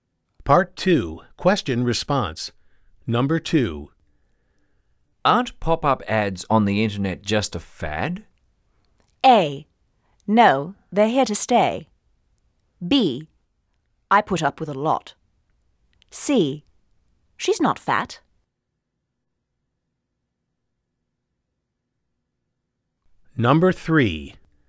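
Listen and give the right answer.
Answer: A: No, they're here to stay.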